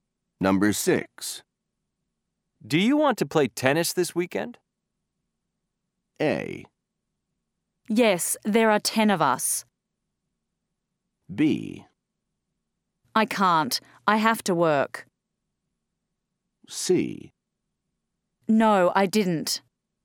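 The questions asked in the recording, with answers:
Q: Do you want to play tennis this weekend?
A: B: I can't. I have to work.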